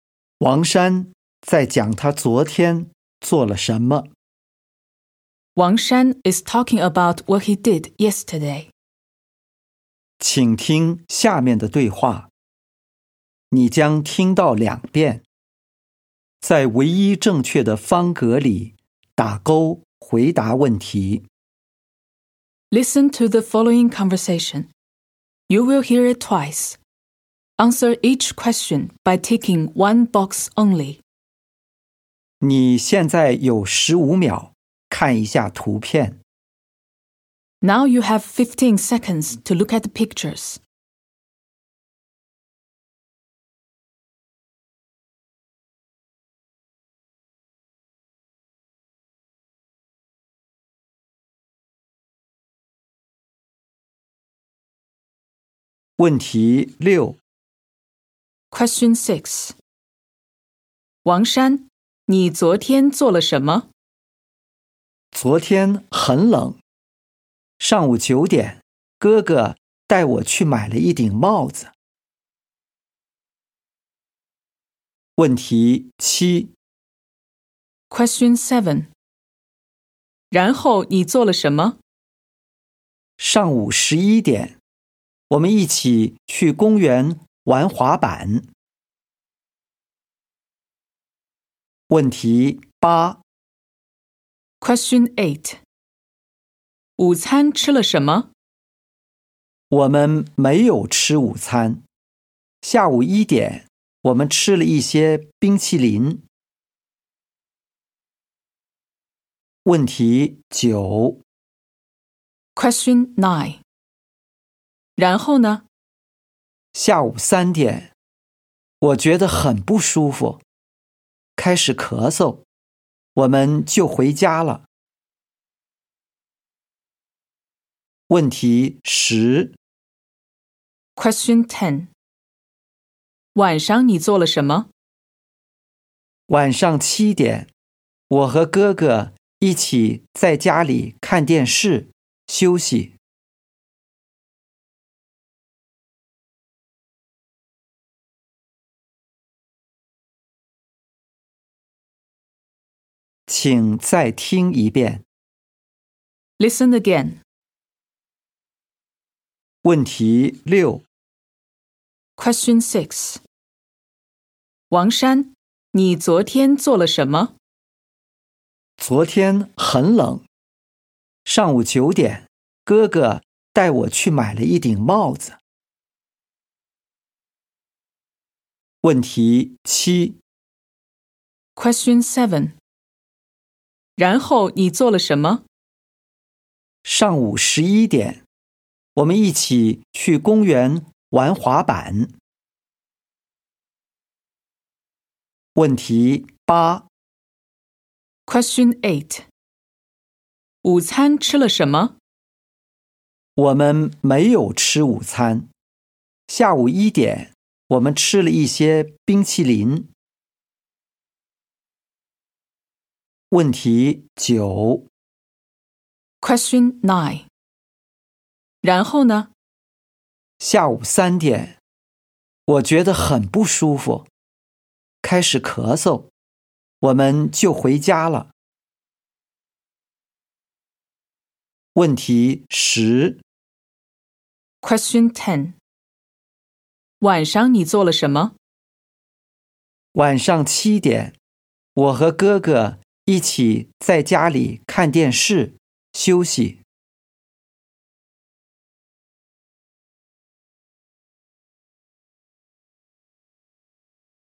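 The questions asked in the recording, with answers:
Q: 王山,你昨天做了什么?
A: 买了一顶帽子

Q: 然后你做了什么?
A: 去公园玩滑板

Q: 午餐吃了什么?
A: 没有吃午餐,吃了一些冰淇淋

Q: 晚上你做了什么?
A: 在家里看电视,休息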